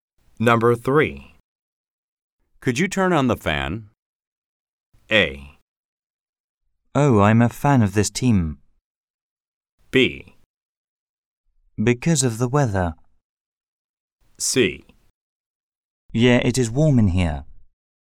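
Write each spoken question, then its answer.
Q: Could you turn on the fan?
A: C: Yeah, it is warm in here.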